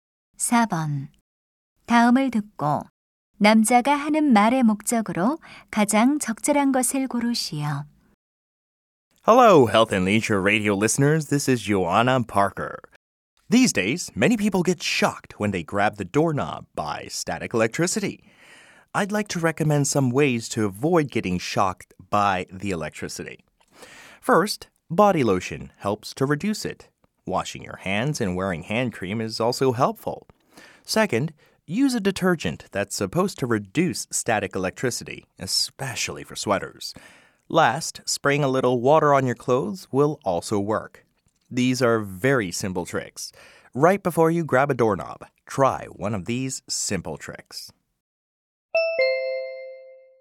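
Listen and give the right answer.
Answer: 정전기를 피하는 방법을 알려 주려고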